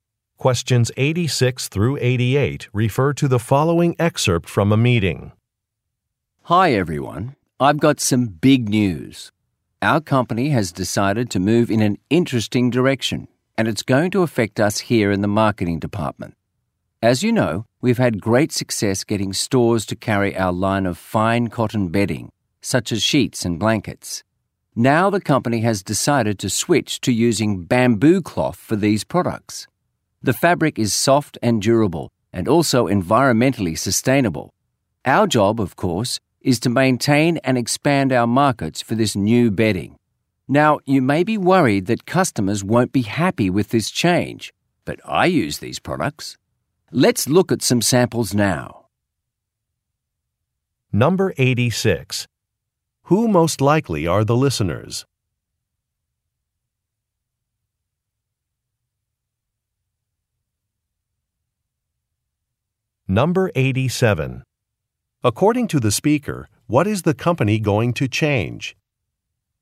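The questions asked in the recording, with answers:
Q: Who most likely are the listeners?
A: Marketing department employees

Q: According to the speaker, what is the company going to change?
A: It will use bamboo cloth instead of cotton for its bedding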